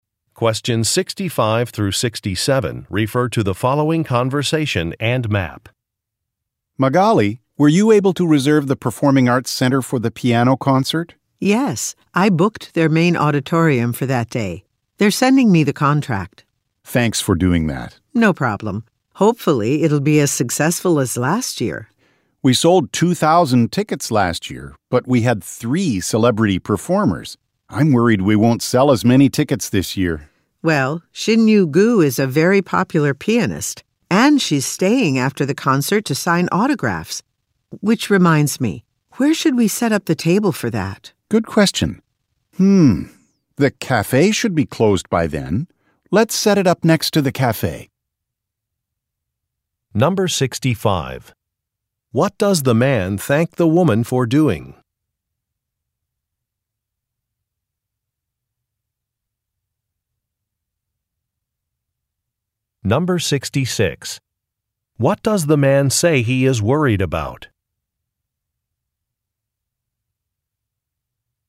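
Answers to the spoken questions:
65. Reserving the Performing Arts Center (main auditorium) for the piano concert
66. That they won't sell as many tickets as last year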